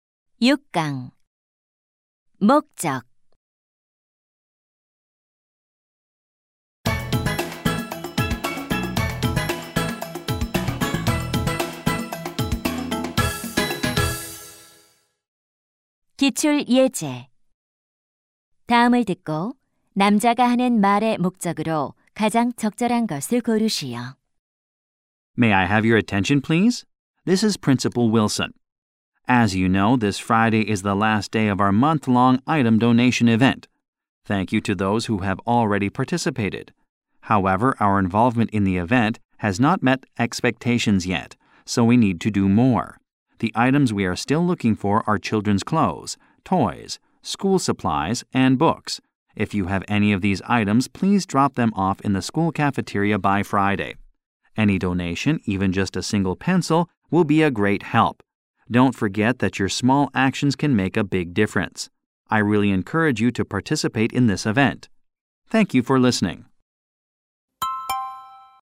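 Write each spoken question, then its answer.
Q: 다음을 듣고 남자가 하는 말의 목적으로 가장 적절한 것을 고르시오.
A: 물품 기부 행사 참여를 독려하려고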